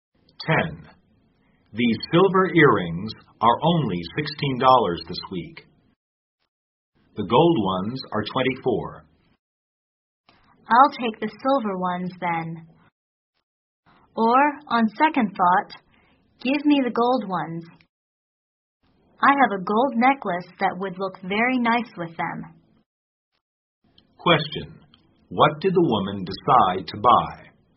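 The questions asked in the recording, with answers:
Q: What did the woman decide to buy?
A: The gold earrings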